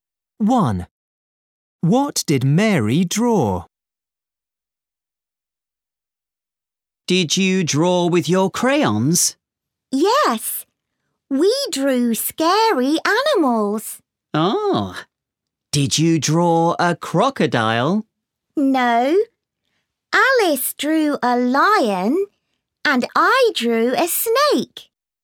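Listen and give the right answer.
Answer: a snake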